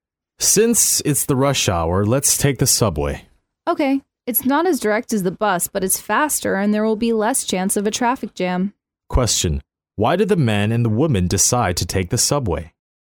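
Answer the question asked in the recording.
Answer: It's faster and there's less chance of a traffic jam during rush hour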